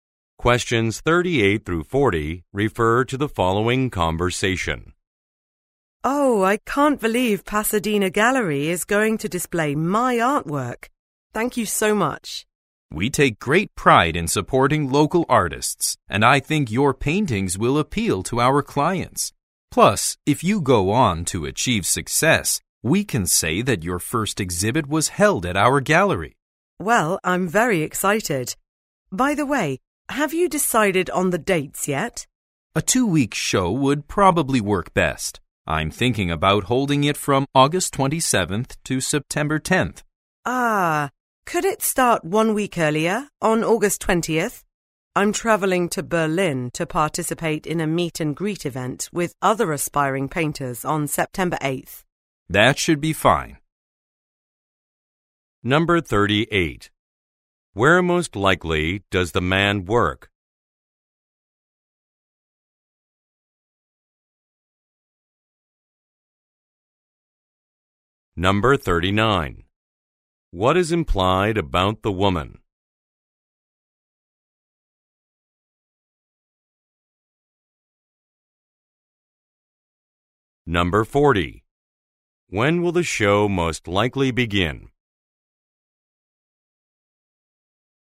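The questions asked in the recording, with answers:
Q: Where most likely does the man work?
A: At an art gallery (Pasadena Gallery)

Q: When will the show most likely begin?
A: On August 20th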